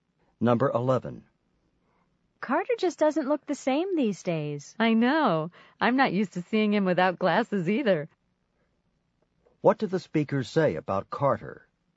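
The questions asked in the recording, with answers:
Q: What did the speaker say about Carter?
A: Carter no longer wears glasses.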